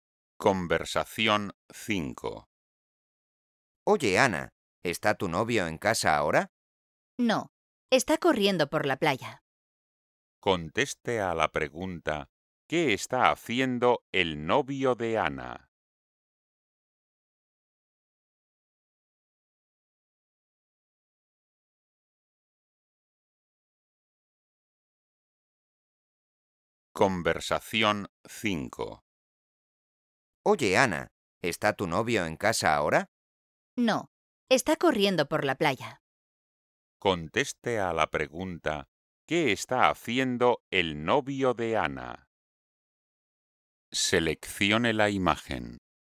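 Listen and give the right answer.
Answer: está corriendo por la playa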